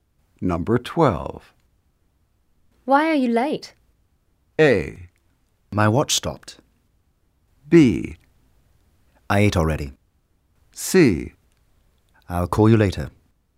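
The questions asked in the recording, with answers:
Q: Why are you late?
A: A: My watch stopped.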